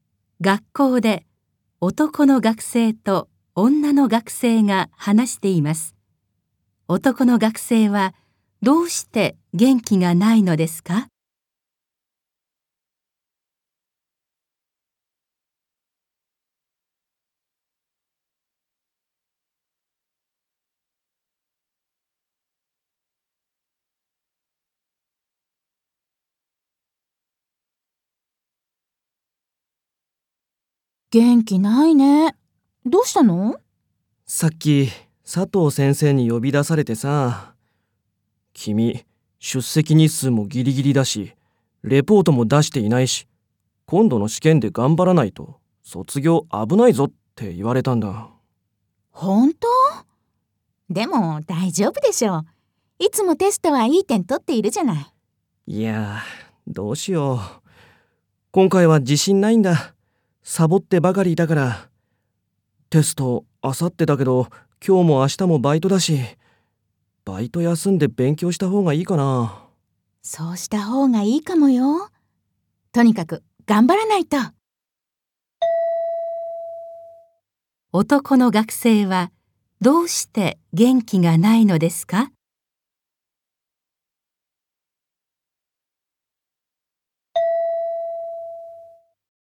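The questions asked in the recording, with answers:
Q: 男の学生はどうして元気がないのですか?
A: 先生に、今度の試験で頑張らないと卒業が危ないと言われたから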